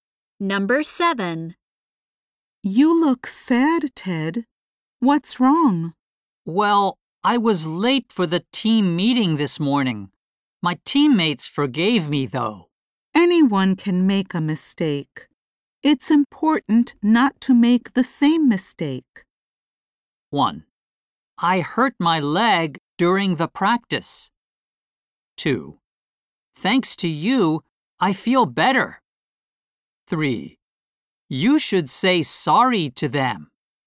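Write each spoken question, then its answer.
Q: It's important not to make the same mistake.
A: 2: Thanks to you, I feel better.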